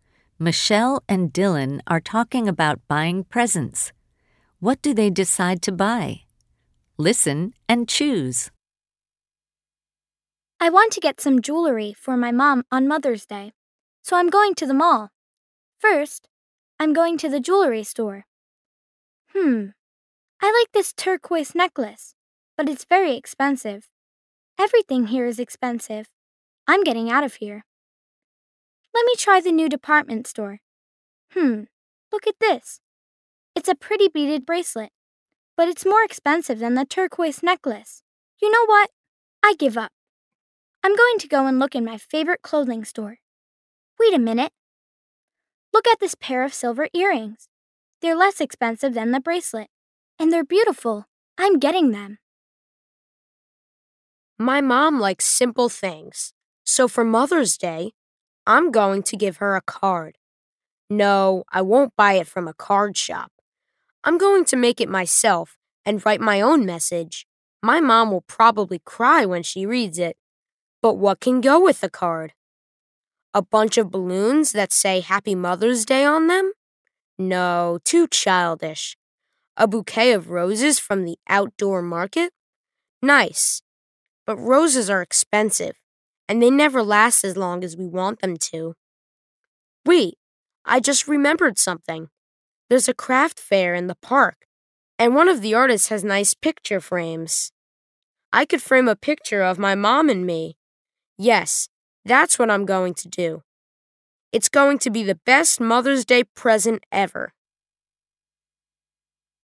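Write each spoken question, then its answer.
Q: What do they decide to buy?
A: Michelle buys silver earrings; Dylan makes a card and gets a picture frame from the craft fair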